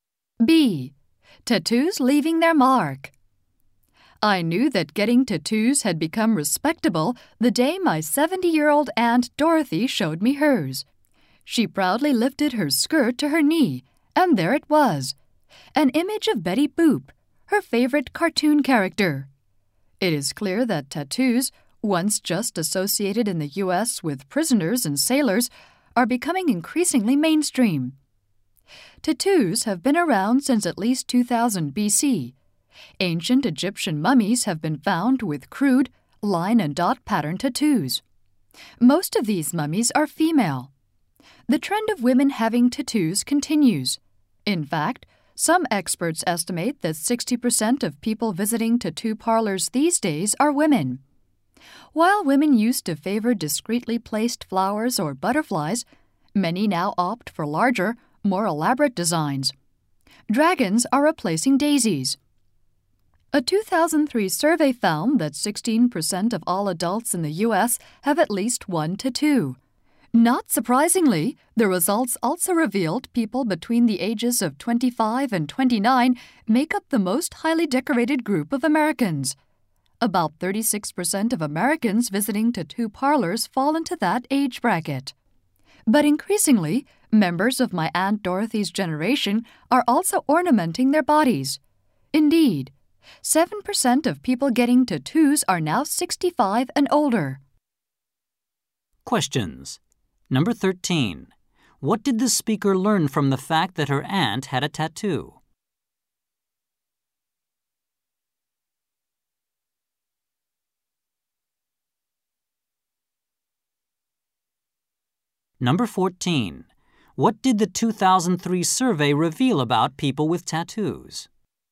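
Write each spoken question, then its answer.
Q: What did the speaker learn from the fact that her aunt had a tattoo?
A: That getting tattoos had become respectable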